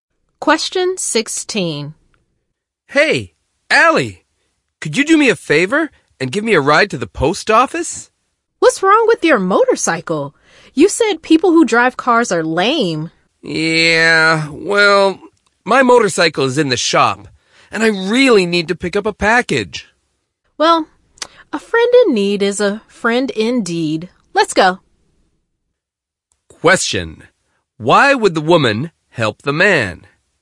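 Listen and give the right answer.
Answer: Because he is her friend and needs a ride; his motorcycle is in the shop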